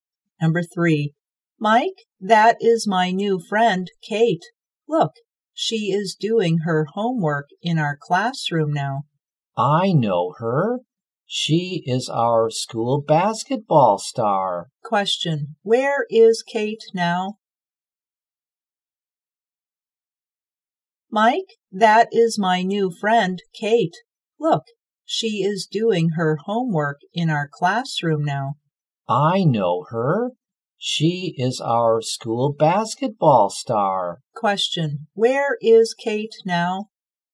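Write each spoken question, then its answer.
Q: Where is Kate now?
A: In the classroom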